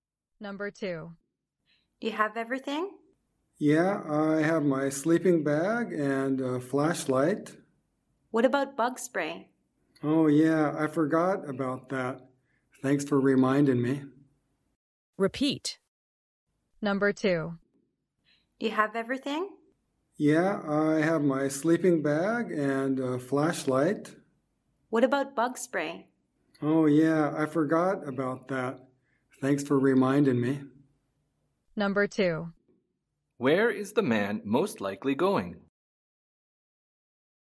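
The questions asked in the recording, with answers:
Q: Where is the man most likely going?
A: Camping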